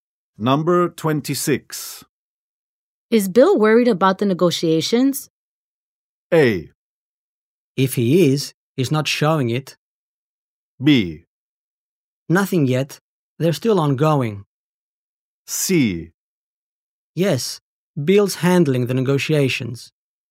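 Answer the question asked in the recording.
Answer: A: If he is, he's not showing it.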